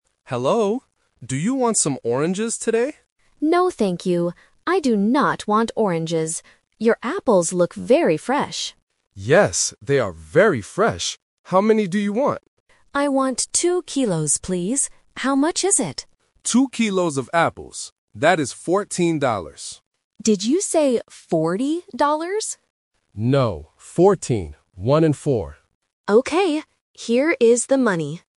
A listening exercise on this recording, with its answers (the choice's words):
Listen to the conversation and choose the correct answer (A, B, or C).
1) What fruit does the customer want to buy?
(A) Apples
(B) Oranges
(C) Bananas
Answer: Apples

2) How do the apples look?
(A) Big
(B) Fresh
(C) Red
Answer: Fresh

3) How much do the apples cost?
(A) $40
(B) $14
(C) $2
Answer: $14

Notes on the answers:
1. The customer says, "Your apples look very fresh" and buys them. Option (B) "Oranges" is a trap because the seller asks "Do you want some oranges?", but the customer rejects it ("No, thank you. I do not want oranges"). Option (C) is a fruit but is not mentioned.
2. The customer states the apples look very "fresh". Options (A) and (C) are common adjectives for apples but are not mentioned in the audio.
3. The seller clearly states the price is "fourteen dollars" and clarifies "One and four." Option (A) $40 is a classic A1 sound trap (-teen vs -ty); the customer mishears and asks "Did you say forty dollars?" but the seller says "No". Option (C) $2 is a distractor using the number of kilos.

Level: A1